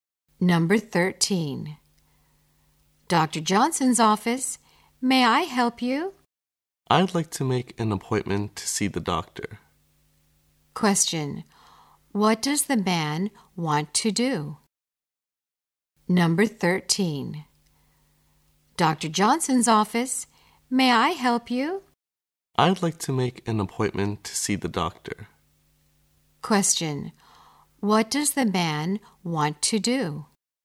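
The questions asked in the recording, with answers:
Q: what does the man want to do?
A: Make an appointment to see the doctor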